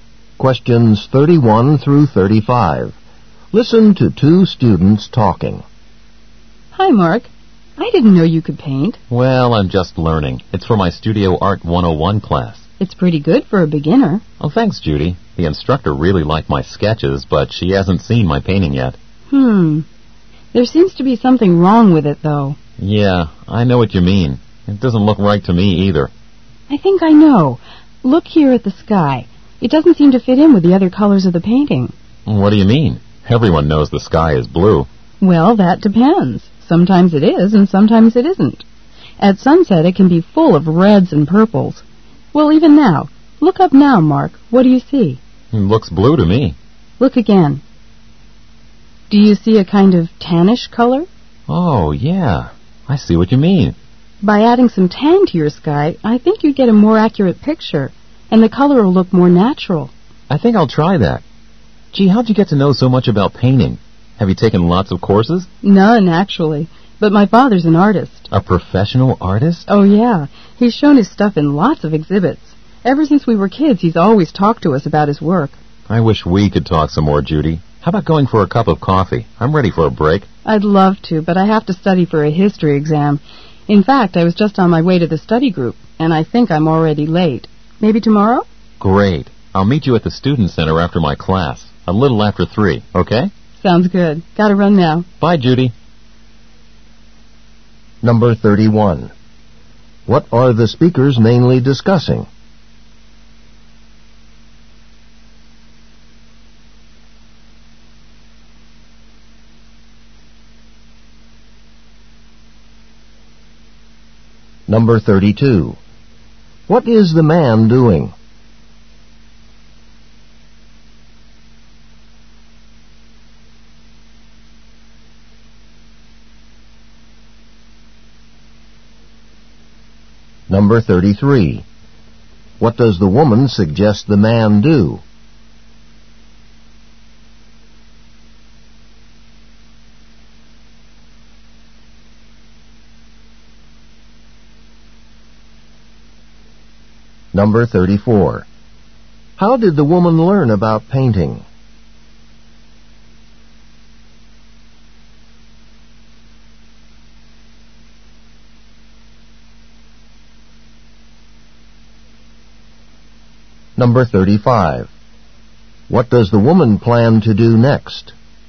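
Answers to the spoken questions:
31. The man's painting, especially the color of the sky.
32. Painting a picture for his Studio Art class.
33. Add some tan to the sky.
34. From her father, who is an artist.
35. Go to her study group for a history exam.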